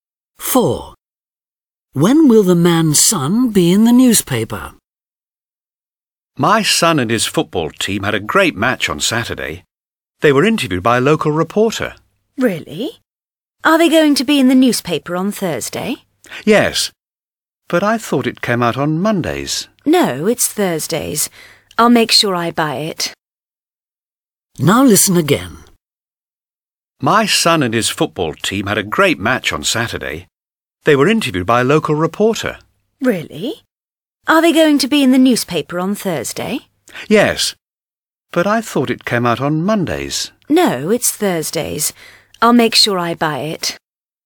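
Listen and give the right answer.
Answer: on Thursday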